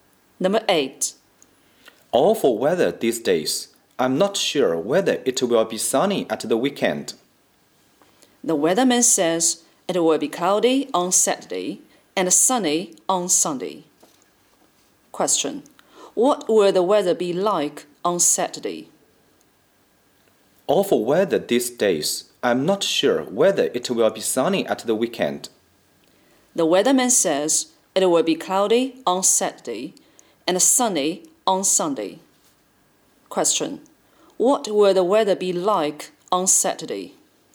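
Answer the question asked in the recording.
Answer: Cloudy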